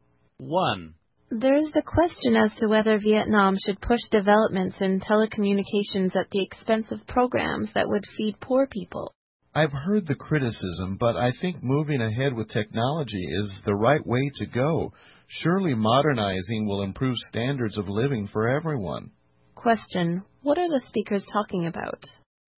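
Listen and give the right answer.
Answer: Whether Vietnam should push telecommunications development instead of programs to feed poor people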